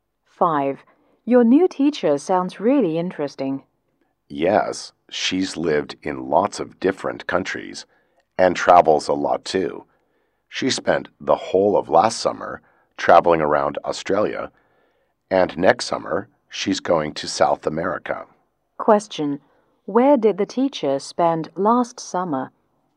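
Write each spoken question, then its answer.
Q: Where did the teacher spend last summer?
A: In Australia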